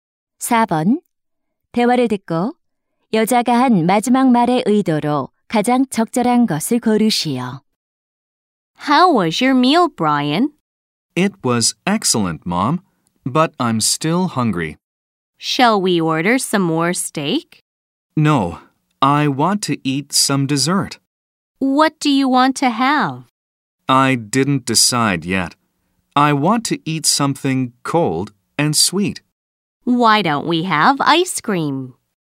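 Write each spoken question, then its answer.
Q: 대화를 듣고 여자가 한 마지막 말의 의도로 가장 적절한 것을 고르시오.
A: 제안 (아이스크림을 먹자고 제안함)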